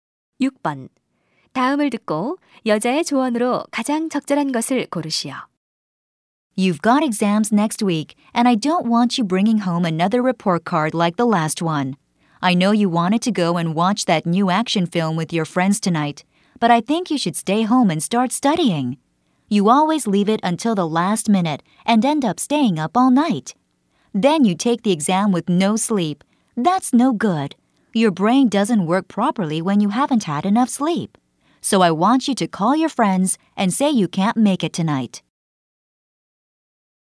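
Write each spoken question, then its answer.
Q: 다음을 듣고 여자의 조언으로 가장 적절한 것을 고르시오.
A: 영화 보러 가지 말고 집에서 시험 공부를 시작해라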